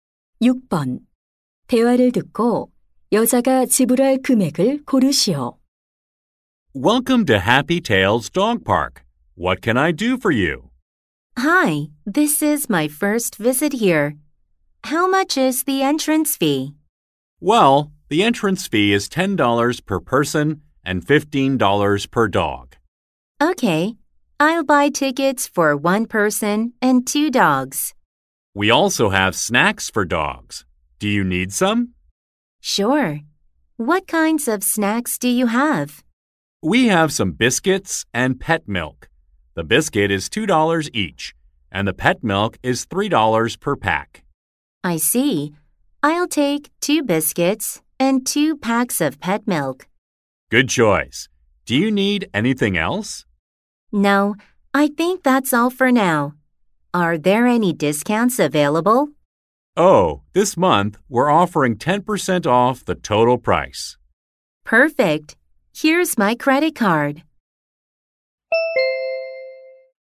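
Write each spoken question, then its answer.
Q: 대화를 듣고 여자가 지불할 금액을 고르시오.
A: $45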